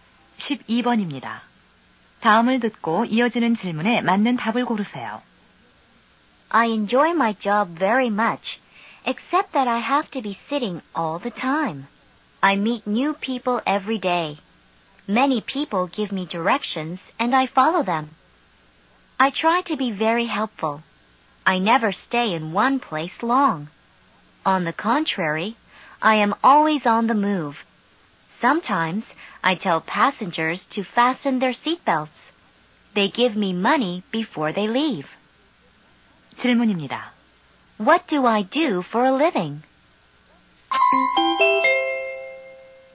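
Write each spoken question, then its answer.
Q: What do I do for a living?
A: 택시 운전사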